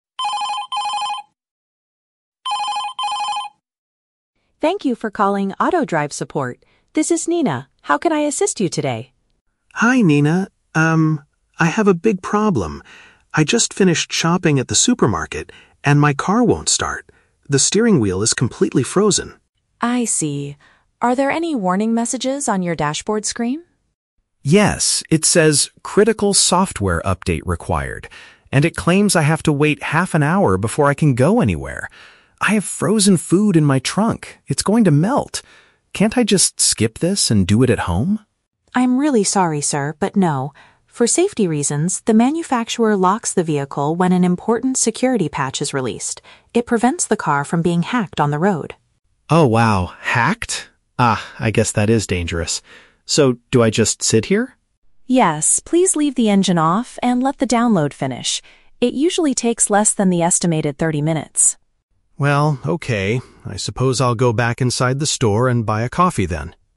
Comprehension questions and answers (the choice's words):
Listen to a phone conversation between a driver and a tech support agent, then choose the correct answer (A, B, or C) for each question.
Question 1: Where is the driver currently located?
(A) At his house with melting groceries.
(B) In the parking area of a grocery store.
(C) At a coffee shop next to the highway.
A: In the parking area of a grocery store.

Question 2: Why can't the man drive his vehicle right now?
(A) The system must install an essential safety fix.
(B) The physical steering wheel is heavily damaged.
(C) A hacker has already taken control of the car.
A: The system must install an essential safety fix.

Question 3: What does the driver decide to do while waiting?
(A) He will sit inside the car with the engine running.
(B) He will try to cancel the download and drive away.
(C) He will return to the supermarket to get a warm drink.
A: He will return to the supermarket to get a warm drink.

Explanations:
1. Tom says he just finished shopping at the "supermarket," which is a synonym for a grocery store. Why the trap is wrong: Option (A) is a trap. He mentions that his "frozen food" is going to melt, but he is not at his house yet. Option (C) is a trap because he mentions buying coffee at the end, but he is currently at the store, not a coffee shop by the highway.
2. Nina explains that the manufacturer released an "important security patch" that requires the car to update. "Essential safety fix" is a paraphrase of this. Why the trap is wrong: Option (B) is a trap. Tom says the steering wheel is "completely frozen" (locked), but it is not physically damaged or broken. Option (C) is a trap because the update prevents the car from being hacked; it hasn't actually been hacked yet.
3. At the end of the conversation, Tom says, "I'll go back inside the store and buy a coffee." Getting a warm drink is a paraphrase for buying a coffee. Why the trap is wrong: Option (A) is a trap. Nina explicitly tells him to "leave the engine off," so he cannot keep it running. Option (B) is a trap because he asked if he could "skip this" (cancel the download) earlier, but Nina said no, and he accepted it.

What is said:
Nina: Thank you for calling AutoDrive Support. This is Nina. How can I assist you today?
Tom: Hi, Nina. Um, I have a big problem. I just finished shopping at the supermarket, and my car won't start. The steering wheel is completely frozen.
Nina: I see. Are there any warning messages on your dashboard screen?
Tom: Yes, it says "Critical Software Update Required." And it claims I have to wait half an hour before I can go anywhere! I have frozen food in my trunk; it's going to melt! Can't I just skip this and do it at home?
Nina: I'm really sorry, sir, but no. For safety reasons, the manufacturer locks the vehicle when an important security patch is released. It prevents the car from being hacked on the road.
Tom: Oh, wow. Hacked? Ah, I guess that is dangerous. So, do I just sit here?
Nina: Yes, please leave the engine off and let the download finish. It usually takes less than the estimated 30 minutes.